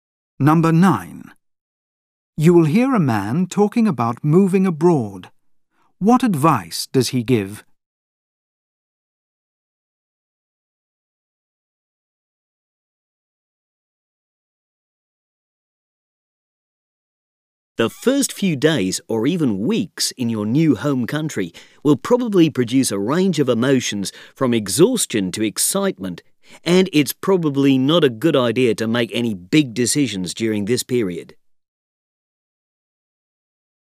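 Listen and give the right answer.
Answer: Don't make big decisions in the first days or weeks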